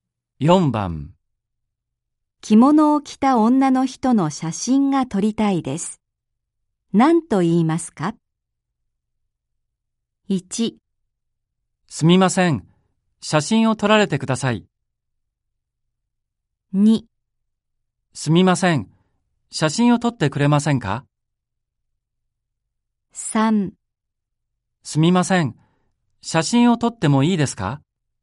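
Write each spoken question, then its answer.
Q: 着物を着た女の人の写真が撮りたいです。何と言いますか?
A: 3: すみません。写真を撮ってもいいですか?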